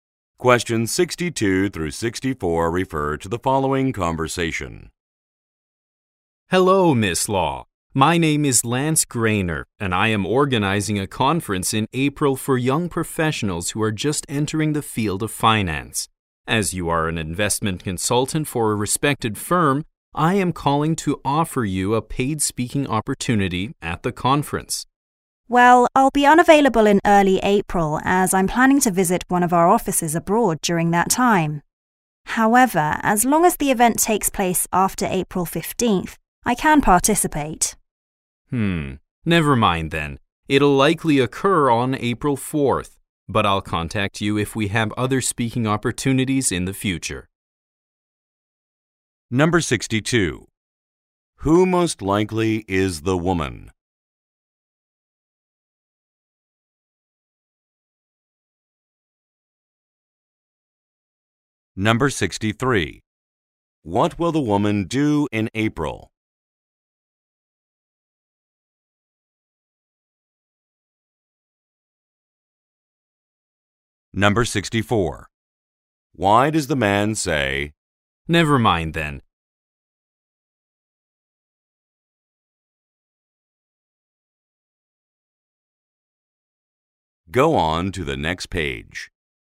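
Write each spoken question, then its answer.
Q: Who most likely is the woman?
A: An investment consultant

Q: What will the woman do in April?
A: Visit one of her firm's offices abroad

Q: Why does the man say,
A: The conference will be before she is available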